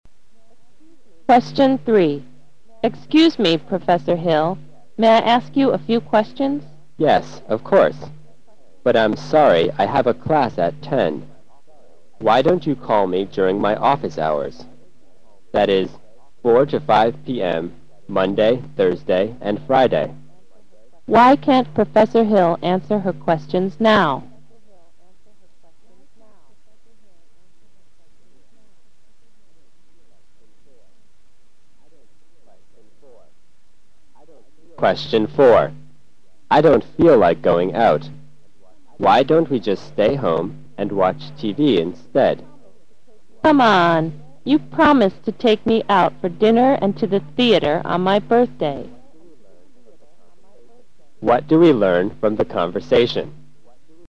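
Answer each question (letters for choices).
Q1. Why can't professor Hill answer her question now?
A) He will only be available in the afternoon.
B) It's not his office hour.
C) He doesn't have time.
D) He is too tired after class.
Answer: C

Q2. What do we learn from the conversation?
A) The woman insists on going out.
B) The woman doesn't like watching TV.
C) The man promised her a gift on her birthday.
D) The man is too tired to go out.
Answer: A

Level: 大学英语四级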